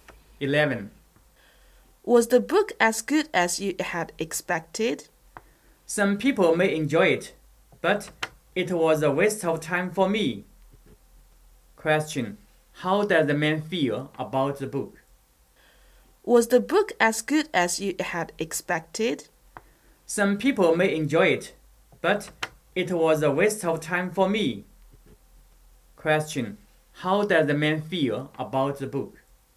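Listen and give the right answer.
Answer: It was a waste of time for him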